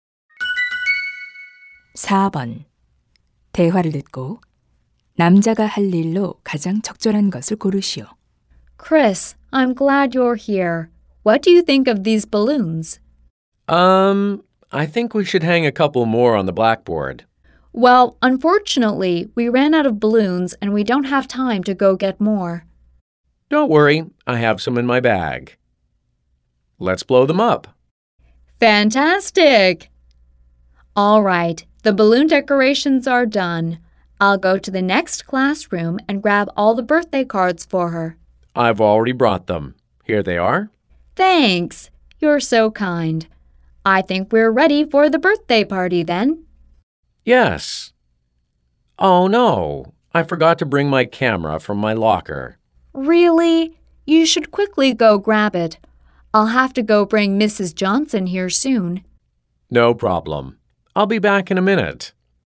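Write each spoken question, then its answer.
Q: 대화를 듣고 남자가 할 일로 가장 적절한 것을 고르시오.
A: 사물함에서 카메라 가져오기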